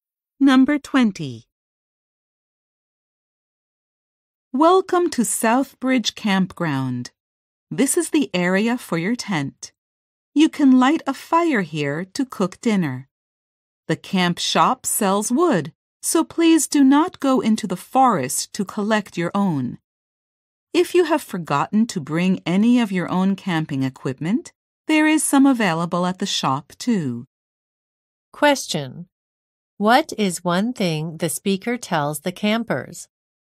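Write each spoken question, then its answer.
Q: What is one thing the speaker tells the campers?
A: Buy wood at the camp shop instead of collecting it in the forest.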